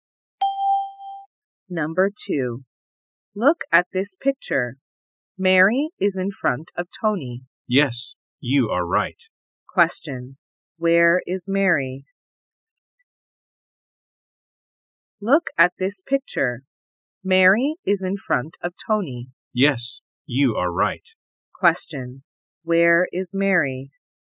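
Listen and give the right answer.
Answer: In front of Tony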